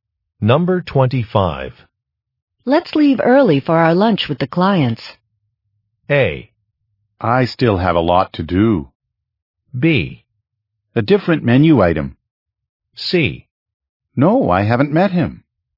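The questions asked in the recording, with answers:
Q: Let's leave early for our lunch with the clients.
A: A: I still have a lot to do.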